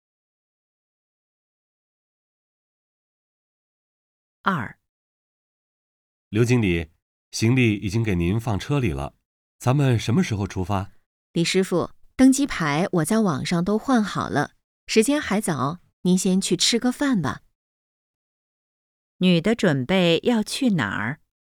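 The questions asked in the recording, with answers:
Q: 女的准备要去哪儿?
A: 机场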